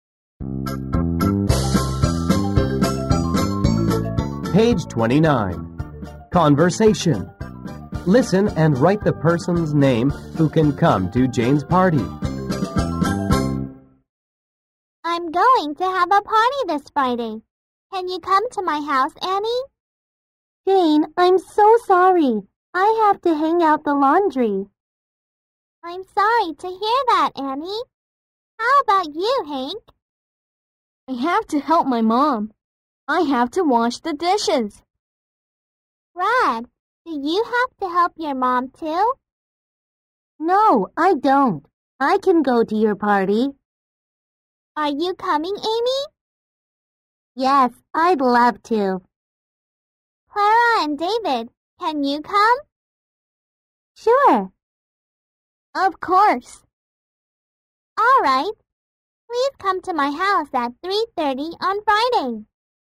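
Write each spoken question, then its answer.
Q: Listen and write the person's name who can come to Jane's party.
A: Brad, Amy, Clara and David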